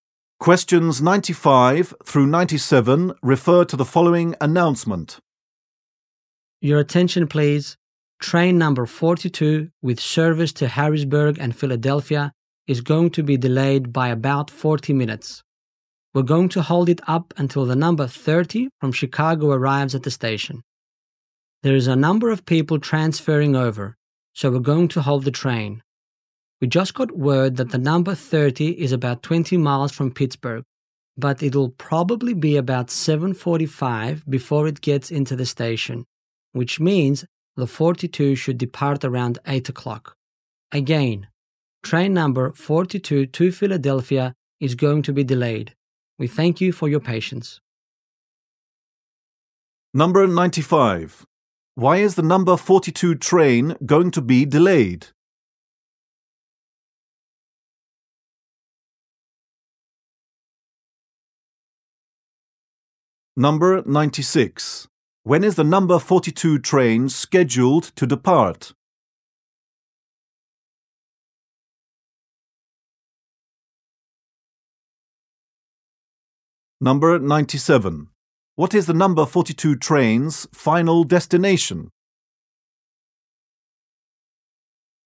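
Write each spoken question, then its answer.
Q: Why is the number 42 train going to be delayed?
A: To wait for passengers transferring from the number 30 from Chicago

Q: When is the number 42 train scheduled to depart?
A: Around 8 o'clock

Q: What is the number 42 train's final destination?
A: Philadelphia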